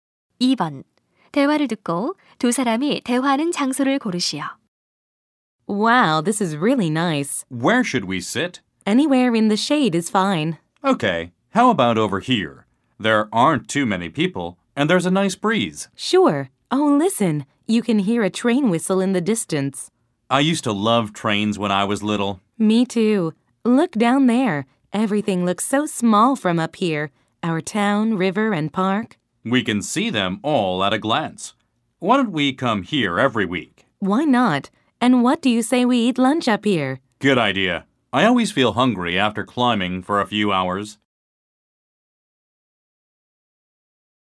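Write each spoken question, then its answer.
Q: 대화를 듣고 두 사람이 대화하는 장소를 고르시오.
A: 산 정상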